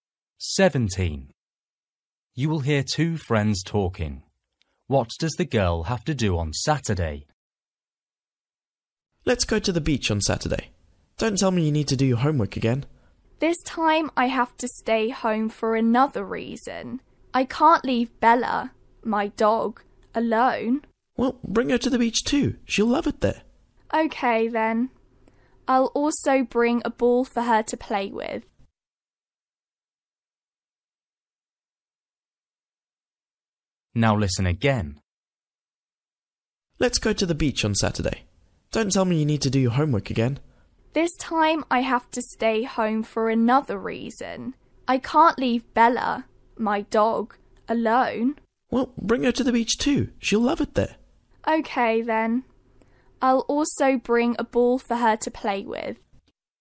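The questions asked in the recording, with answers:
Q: What does the girl have to do on Saturday?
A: Look after her dog Bella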